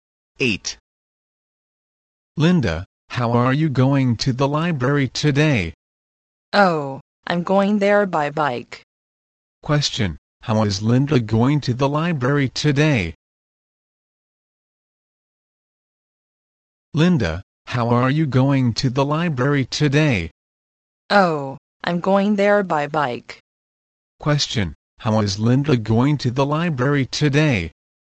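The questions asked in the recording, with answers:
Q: Question, how is Linda going to the library today?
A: By bike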